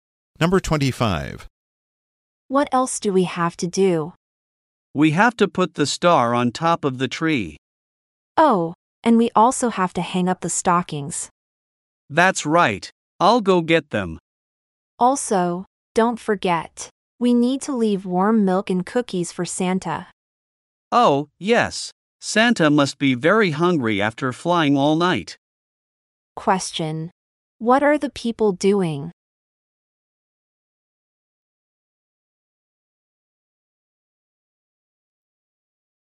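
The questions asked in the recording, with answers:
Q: What are the people doing?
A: Getting ready for Christmas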